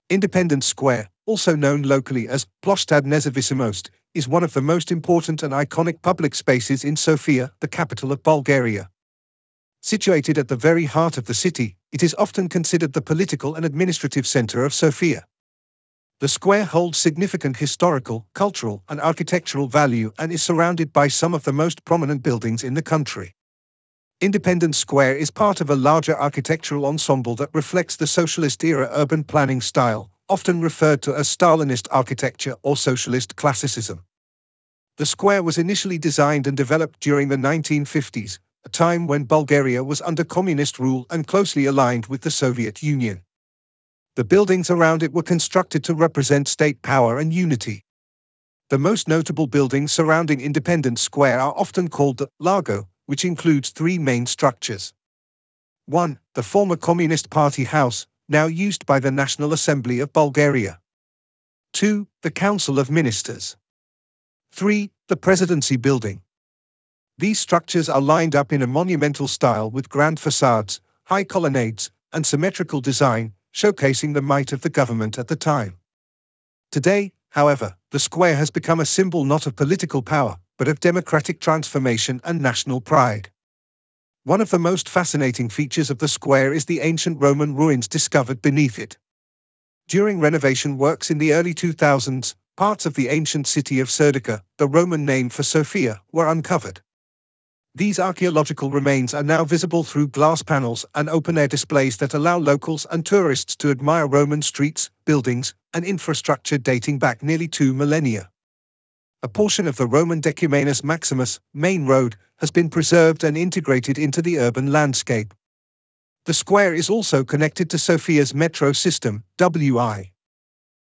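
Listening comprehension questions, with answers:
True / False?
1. Independence Square is located in the northern part of Sofia.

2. The buildings around the square are examples of Socialist Classicism architecture.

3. Ancient Roman ruins were discovered beneath the square.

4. It has excellent public transport connections, including a metro station.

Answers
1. False
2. True
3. True
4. True

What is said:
Independence Square, also known locally as "Ploshtad Nezavisimost", is one of the most important and iconic public spaces in Sofia, the capital of Bulgaria. Situated at the very heart of the city, it is often considered the political and administrative center of Sofia. The square holds significant historical, cultural, and architectural value and is surrounded by some of the most prominent buildings in the country.
Independence Square is part of a larger architectural ensemble that reflects the socialist-era urban planning style, often referred to as Stalinist architecture or Socialist Classicism. 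The square was initially designed and developed during the 1950s, a time when Bulgaria was under communist rule and closely aligned with the Soviet Union. The buildings around it were constructed to represent state power and unity.
The most notable buildings surrounding Independence Square are often called the "Largo", which includes three main structures:
• The former Communist Party House (now used by the National Assembly of Bulgaria)
• The Council of Ministers
• The Presidency Building
These structures are lined up in a monumental style with grand facades, high colonnades, and symmetrical design, showcasing the might of the government at the time. Today, however, the square has become a symbol not of political power, but of democratic transformation and national pride.
One of the most fascinating features of the square is the ancient Roman ruins discovered beneath it. During renovation works in the early 2000s, parts of the ancient city of Serdica (the Roman name for Sofia) were uncovered. 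These archaeological remains are now visible through glass panels and open-air displays that allow locals and tourists to admire Roman streets, buildings, and infrastructure dating back nearly two millennia. A portion of the Roman Decumanus Maximus (main road) has been preserved and integrated into the urban landscape.
The square is also connected to Sofia's Metro system, with Serdika Station located directly beneath it.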